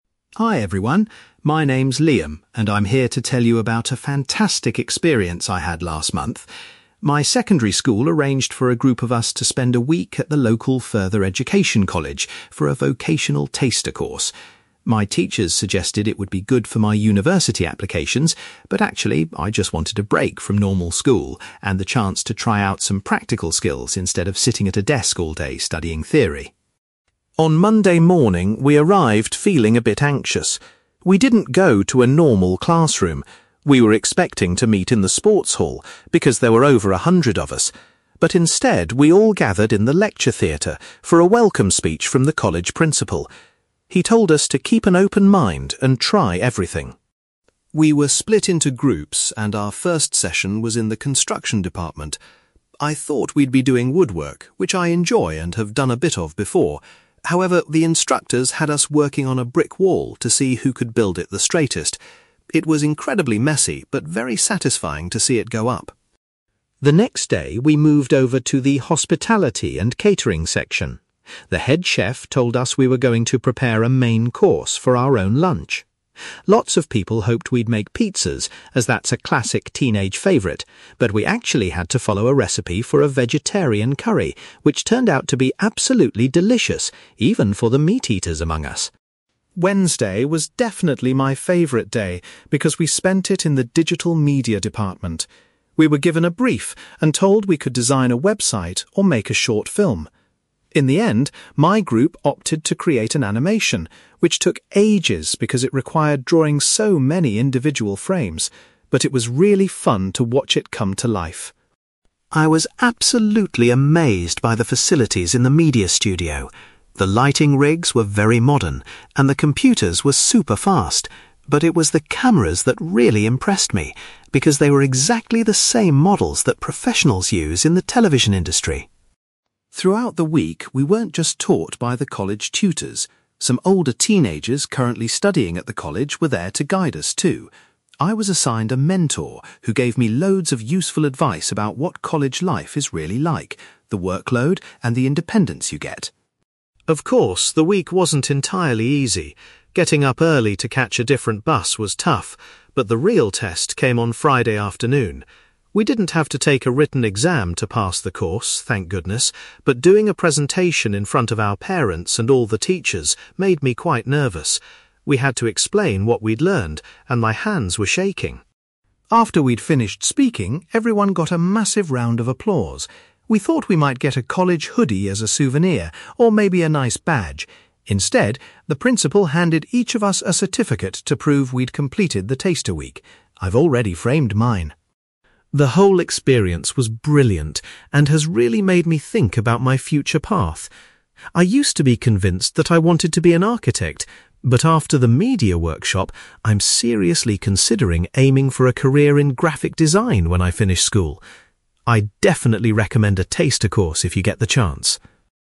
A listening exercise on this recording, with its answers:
You will hear a secondary school student called Liam talking about a week-long vocational taster course he attended at a local college. For questions 9-18, complete the sentences with a word or short phrase.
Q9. Liam's main motivation for doing the course was to acquire some (9)........................... rather than studying theory.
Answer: practical skills

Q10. On the first morning, Liam and the other students were welcomed in the college (10)........................... .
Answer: lecture theatre

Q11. In the construction workshop, Liam's group was challenged to build a (11)........................... .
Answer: brick wall

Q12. During the catering session, the students learned how to prepare a (12)........................... for their lunch.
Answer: vegetarian curry

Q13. Liam's group decided to produce an (13)........................... during the digital media class.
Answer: animation

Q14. Liam was particularly impressed by the high quality of the (14)........................... available in the media studio.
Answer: cameras

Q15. Liam appreciated the useful advice he received from a (15)........................... who currently studies at the college.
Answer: mentor

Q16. Liam felt quite nervous about delivering a (16)........................... at the end of the week.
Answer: presentation

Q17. As a reward for finishing the course, every student was given a (17)........................... to take home.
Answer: certificate

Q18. Liam now thinks he would like to pursue a career in (18)........................... when he finishes school.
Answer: graphic design

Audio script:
Liam: Hi everyone, my name's Liam, and I'm here to tell you about a fantastic experience I had last month. My secondary school arranged for a group of us to spend a week at the local further education college for a vocational taster course. My teachers suggested it would be good for my university applications, but actually, I just wanted a break from normal school and the chance to try out some practical skills instead of sitting at a desk all day studying theory.
On Monday morning, we arrived feeling a bit anxious. We didn't go to a normal classroom. We were expecting to meet in the sports hall because there were over a hundred of us, but instead, we all gathered in the lecture theatre for a welcome speech from the college principal. He told us to keep an open mind and try everything.
We were split into groups, and our first session was in the construction department. I thought we'd be doing woodwork, which I enjoy and have done a bit of before, however, the instructors had us working on a brick wall to see who could build it the straightest. It was incredibly messy, but very satisfying to see it go up.
The next day, we moved over to the hospitality and catering section. The head chef told us we were going to prepare a main course for our own lunch. Lots of people hoped we'd make pizzas, as that's a classic teenage favourite, but we actually had to follow a recipe for a vegetarian curry which turned out to be absolutely delicious, even for the meat-eaters among us!
Wednesday was definitely my favourite day because we spent it in the digital media department. We were given a brief and told we could design a website or make a short film. In the end, my group opted to create an animation, which took ages because it required drawing so many individual frames, but it was really fun to watch it come to life.
I was absolutely amazed by the facilities in the media studio. The lighting rigs were very modern and the computers were super fast, but it was the cameras that really impressed me because they were exactly the same models that professionals use in the television industry.
Throughout the week, we weren't just taught by the college tutors. Some older teenagers currently studying at the college were there to guide us too. I was assigned a mentor who gave me loads of useful advice about what college life is really like, the workload, and the independence you get.
Of course, the week wasn't entirely easy. Getting up early to catch a different bus was tough, but the real test came on Friday afternoon. We didn't have to take a written exam to pass the course, thank goodness, but doing a presentation in front of our parents and all the teachers made me quite nervous. We had to explain what we'd learned, and my hands were shaking!
After we'd finished speaking, everyone got a massive round of applause. We thought we might get a college hoodie as a souvenir, or maybe a nice badge, instead, the principal handed each of us a certificate to prove we'd completed the taster week. I've already framed mine!
The whole experience was brilliant and has really made me think about my future path. I used to be convinced that I wanted to be an architect, but after the media workshop, I'm seriously considering aiming for a career in graphic design when I finish school. I'd definitely recommend a taster course if you get the chance!

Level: B2